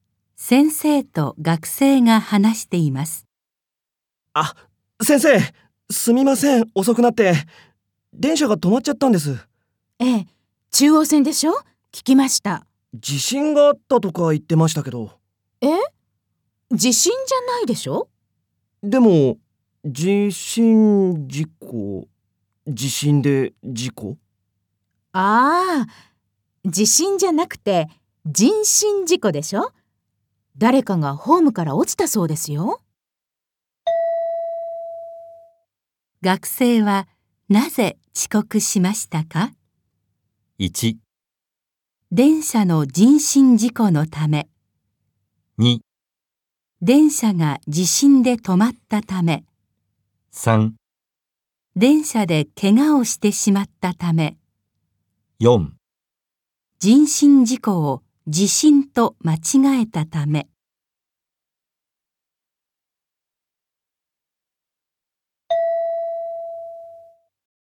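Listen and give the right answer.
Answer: 1: 電車の人身事故のため。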